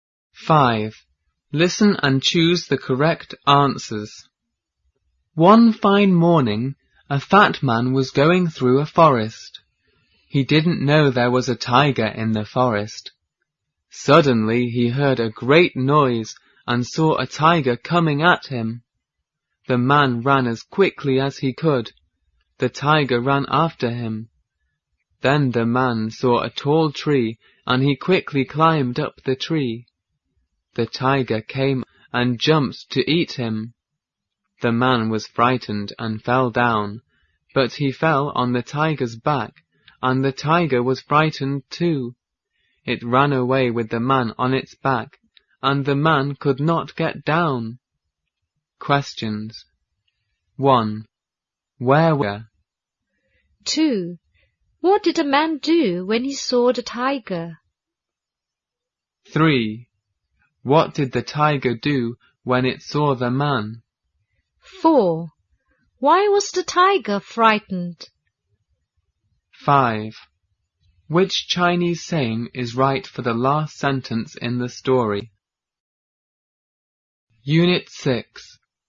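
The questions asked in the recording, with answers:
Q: What did the man do when he saw the tiger?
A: He ran away as quickly as he could and climbed up a tall tree

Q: What did the tiger do when it saw the man?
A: It ran after him and jumped to eat him

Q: Why was the tiger frightened?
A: Because the man fell on its back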